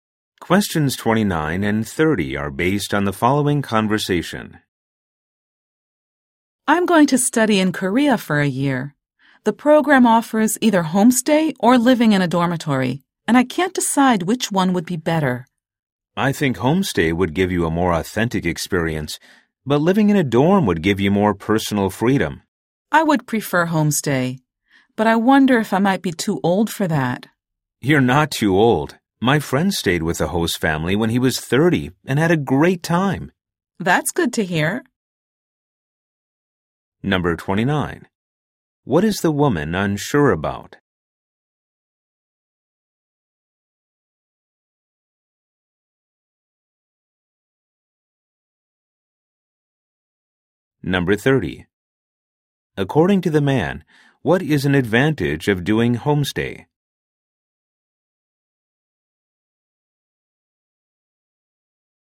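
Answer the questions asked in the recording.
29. Whether to choose homestay or a dormitory
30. A more authentic experience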